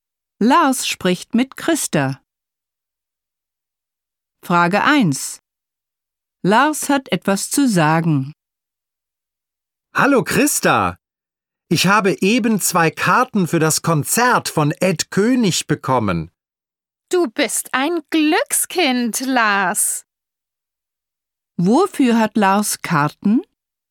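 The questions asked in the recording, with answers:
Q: Wofür hat Lars Karten?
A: Für das Konzert von Ed König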